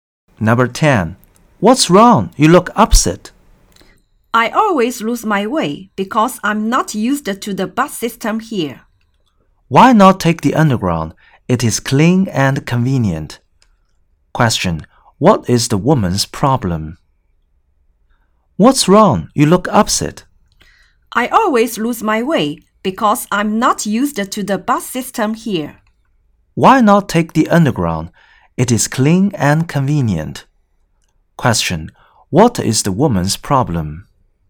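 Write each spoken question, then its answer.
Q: What is the woman's problem?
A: She always loses her way because she isn't used to the bus system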